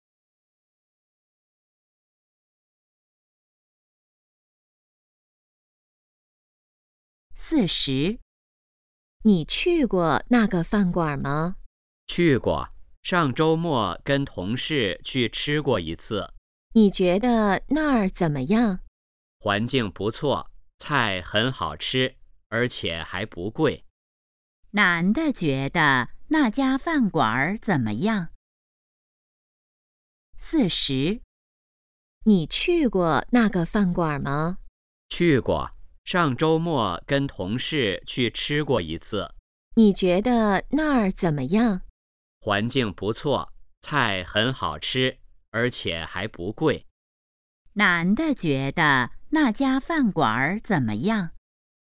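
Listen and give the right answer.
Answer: 环境不错,菜好吃,不贵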